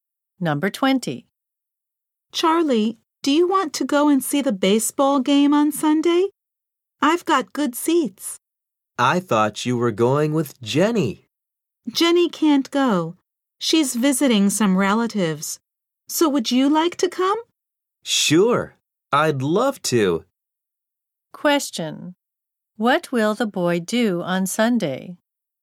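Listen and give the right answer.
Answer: Go to see a baseball game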